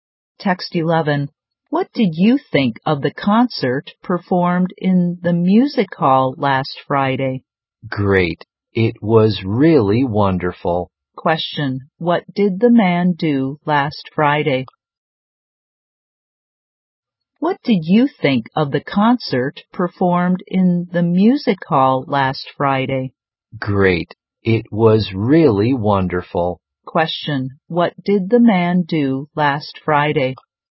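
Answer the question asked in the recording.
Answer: He went to a concert in the music hall.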